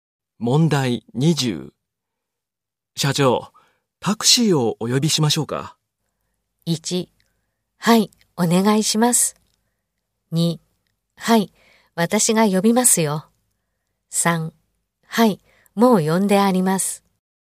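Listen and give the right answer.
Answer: 1: はい、お願いします。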